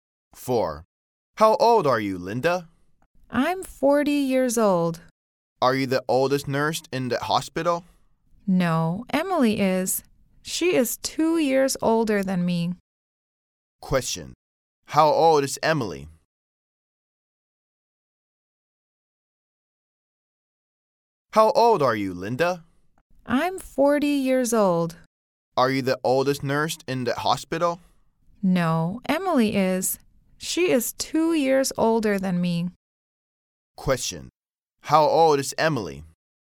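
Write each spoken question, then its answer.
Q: How old is Emily?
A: 42 years old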